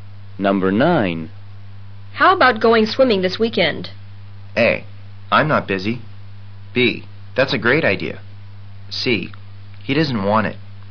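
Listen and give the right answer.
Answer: B: That's a great idea.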